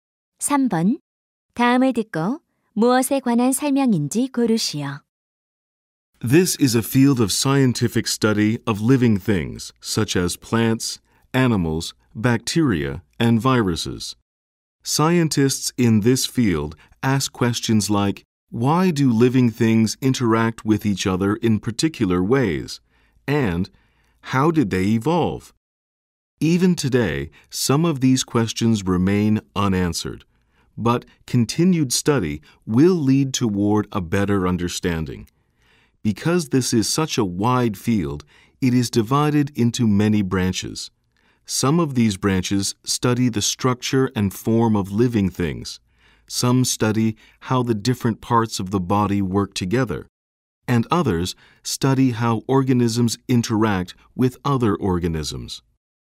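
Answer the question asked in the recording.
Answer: 생물학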